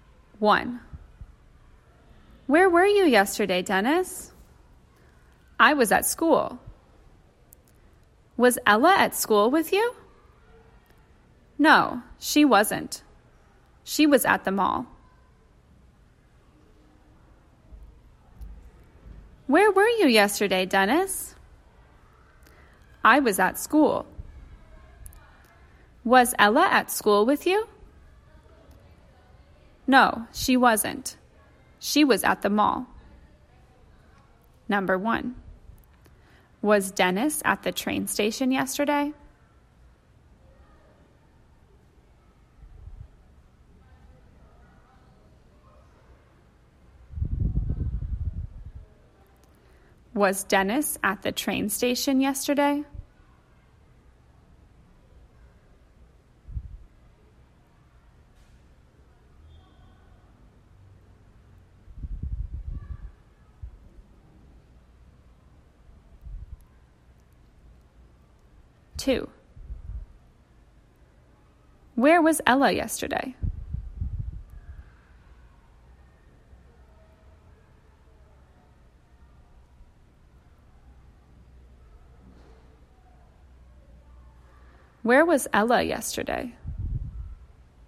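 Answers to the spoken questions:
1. No, he wasn't. He was at school.
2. She was at the mall.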